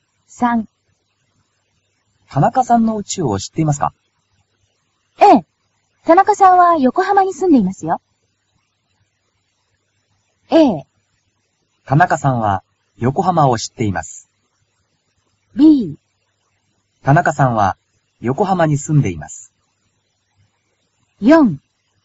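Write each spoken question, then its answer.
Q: 田中さんの家を知っていますか?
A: B: 田中さんは横浜に住んでいます。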